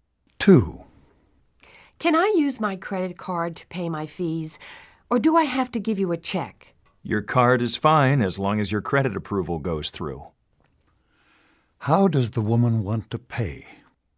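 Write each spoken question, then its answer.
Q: How does the woman want to pay?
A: With her credit card.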